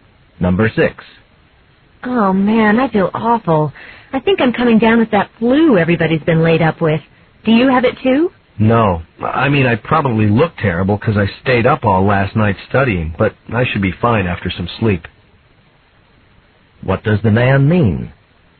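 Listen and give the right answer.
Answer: He isn't sick; he's just tired from staying up studying.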